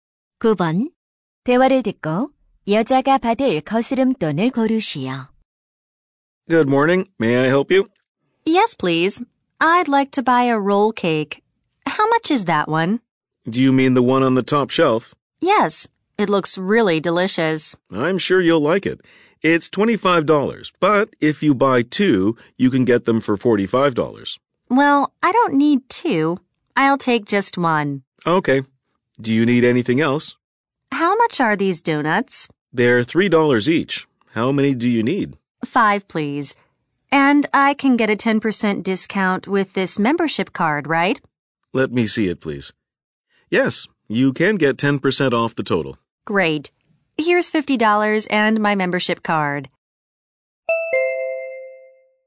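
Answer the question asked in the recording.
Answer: $14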